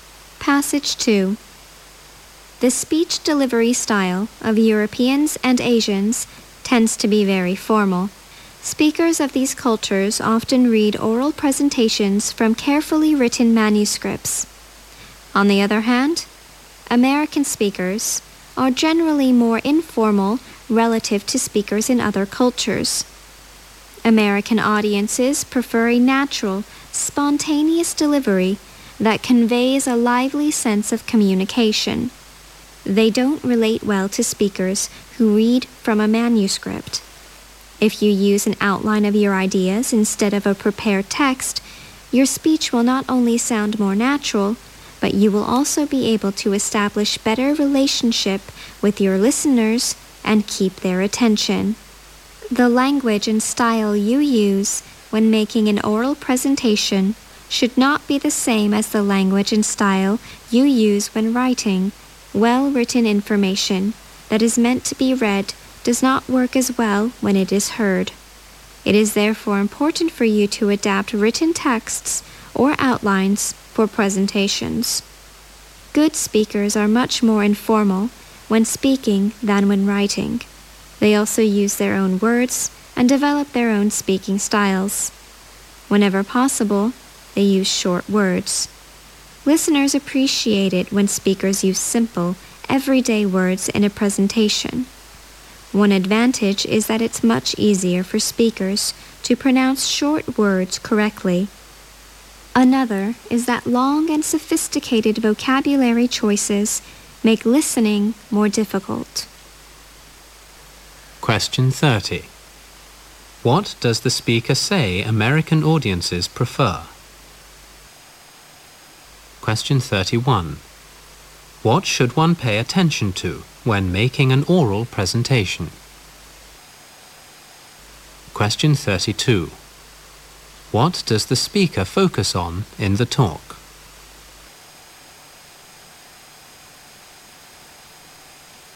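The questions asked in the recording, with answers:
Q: What does the speaker say American audiences prefer?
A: A natural, spontaneous delivery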